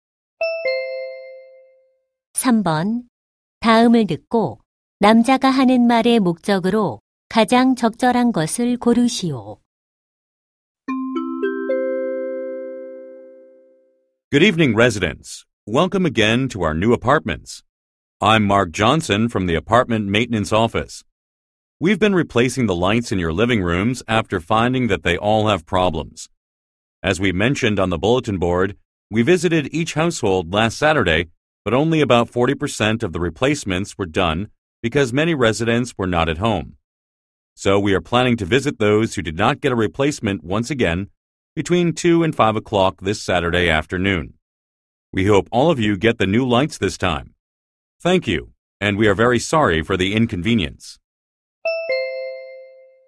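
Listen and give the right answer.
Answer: 이번 토요일 오후 2시~5시에 미교체 가구의 거실 조명 교체 재방문을 안내하려고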